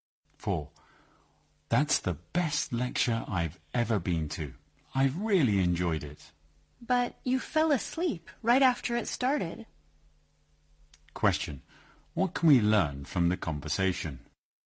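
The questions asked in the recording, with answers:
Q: What can we learn from the conversation?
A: The speaker who praised the lecture actually fell asleep during it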